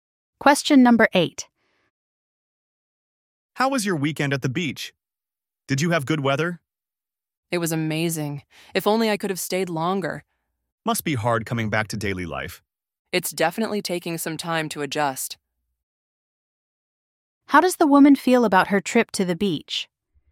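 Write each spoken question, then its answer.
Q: How does the woman feel about her trip to the beach?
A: It was amazing and she wishes she had stayed longer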